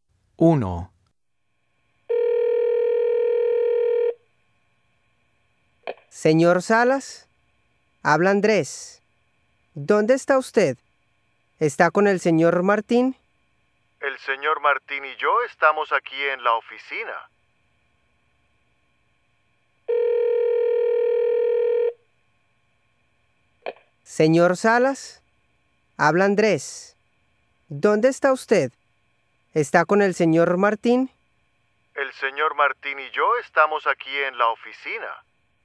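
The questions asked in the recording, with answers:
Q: ¿Dónde está usted?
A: En la oficina, con el señor Martín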